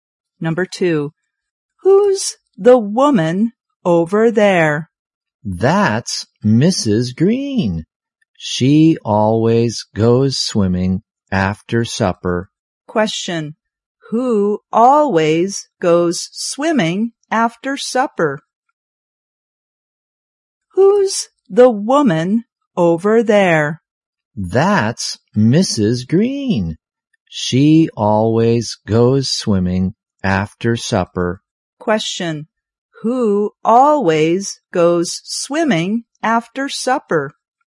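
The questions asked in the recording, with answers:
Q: Question, who always goes swimming after supper?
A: Mrs. Green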